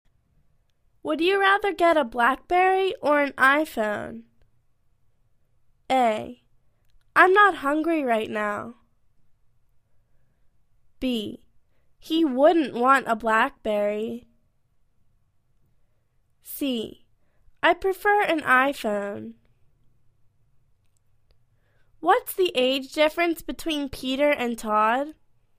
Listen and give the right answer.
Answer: I prefer an I-phone.